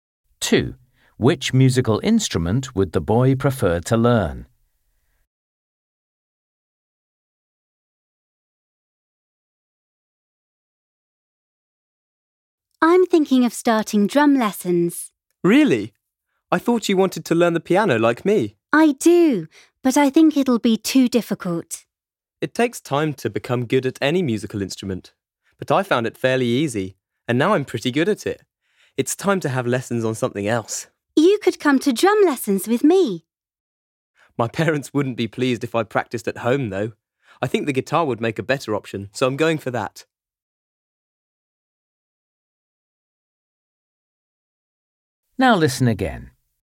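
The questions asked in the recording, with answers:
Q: Which musical instrument would the boy prefer to learn?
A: The guitar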